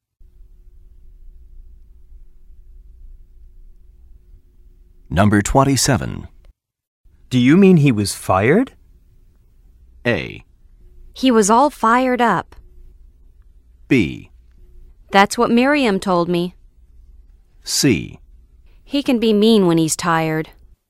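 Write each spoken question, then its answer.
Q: Do you mean he was fired?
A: B: That's what Miriam told me.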